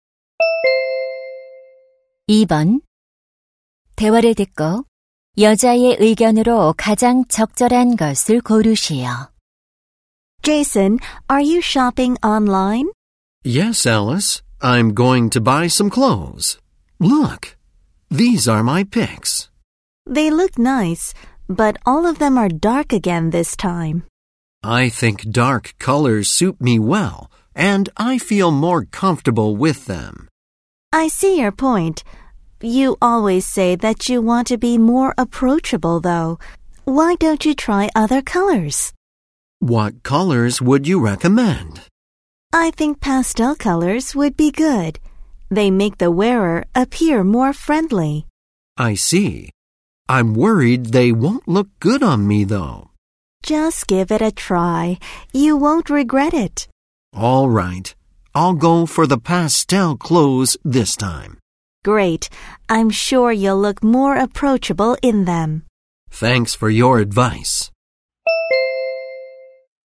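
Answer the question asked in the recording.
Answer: 더 친근해 보이려면 밝은 파스텔 색 옷을 입어 보는 것이 좋다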